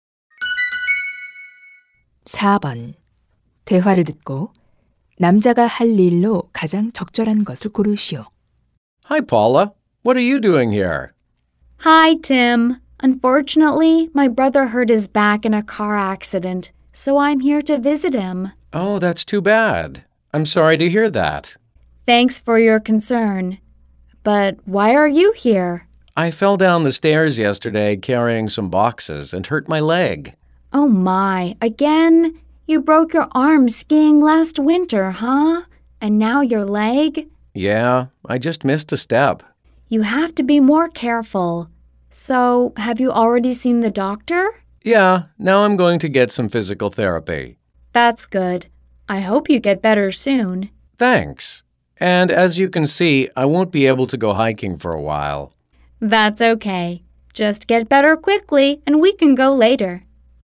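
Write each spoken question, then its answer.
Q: 대화를 듣고 남자가 할 일로 가장 적절한 것을 고르시오.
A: 물리 치료 받기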